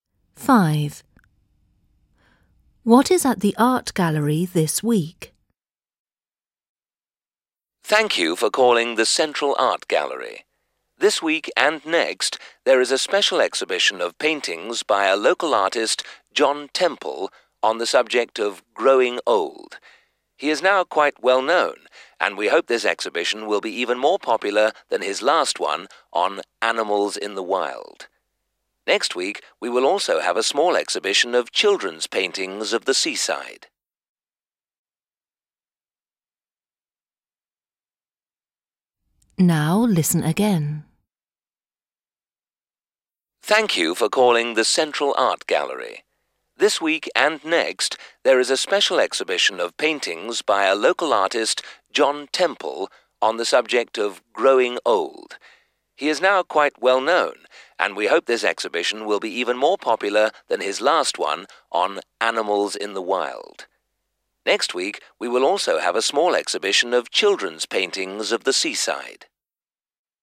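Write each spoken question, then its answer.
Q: What is at the art gallery this week?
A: paintings of old people (growing old) by John Temple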